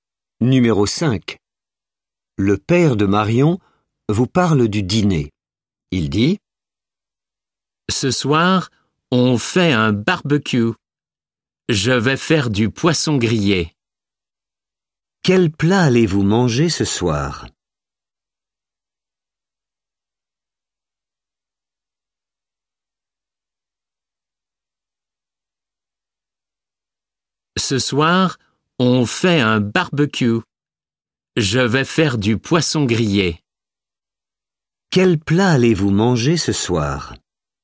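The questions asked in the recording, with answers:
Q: Quel plat allez-vous manger ce soir ?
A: Du poisson grillé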